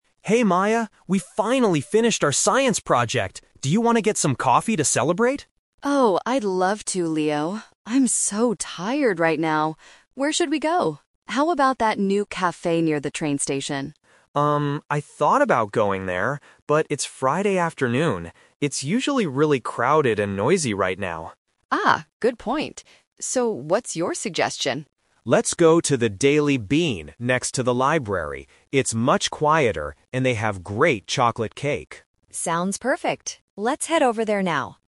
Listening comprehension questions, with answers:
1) Where are they going to drink coffee?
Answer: At the café next to the library.

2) Why doesn't Leo want to go to the new café?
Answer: Because it is too busy and loud.

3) What does Leo say about the Daily Bean?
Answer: It has very good cake.

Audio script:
Leo: Hey Maya, we finally finished our science project! Do you want to get some coffee to celebrate?
Maya: Oh, I'd love to, Leo. I'm so tired right now. Where should we go? How about that new café near the train station?
Leo: Um, I thought about going there, but it's Friday afternoon. It's usually really crowded and noisy right now.
Maya: Ah, good point. So, what's your suggestion?
Leo: Let's go to the Daily Bean next to the library. It's much quieter, and they have great chocolate cake.
Maya: Sounds perfect. Let's head over there now.